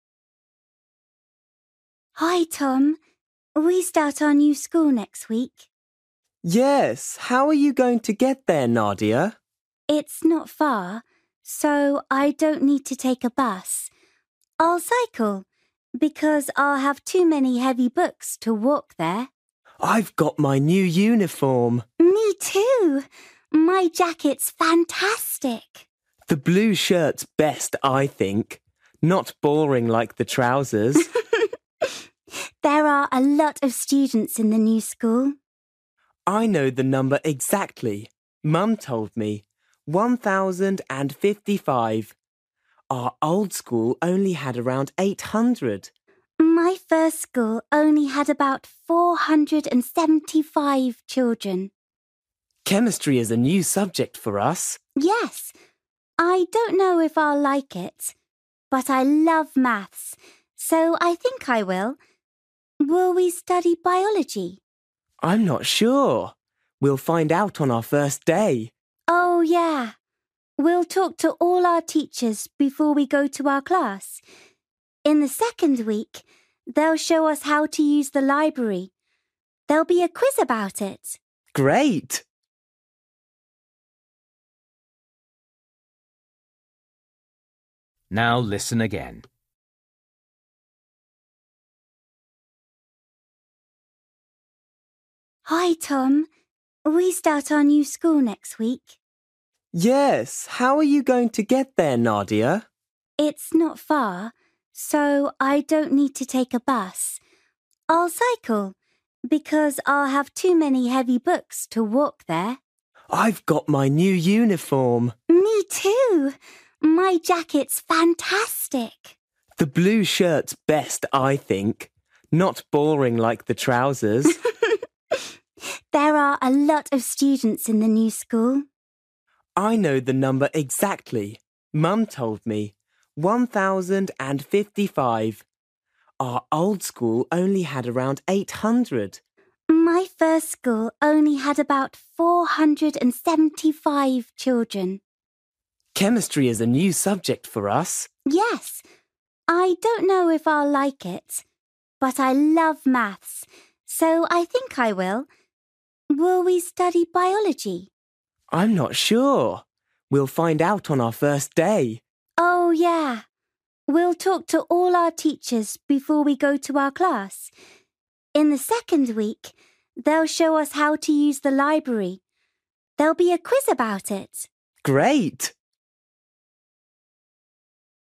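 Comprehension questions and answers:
For each question, choose the correct answer.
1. How will Nadia get to their new school?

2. What doesn't Tom like about the school uniform?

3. How many students are there in the new school?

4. Which subject does Nadia like?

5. What will they do on the first day?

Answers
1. By bike (she'll cycle)
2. The trousers
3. 1,055
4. Maths
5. Talk to all their teachers

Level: Luyện nghe trình độ A2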